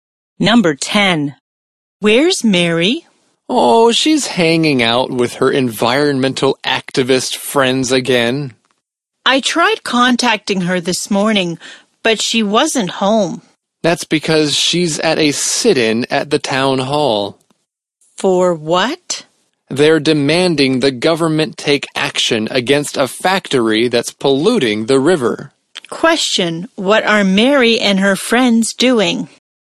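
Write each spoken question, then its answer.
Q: what are Mary and her friends doing?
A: Holding a sit-in at the town hall against a polluting factory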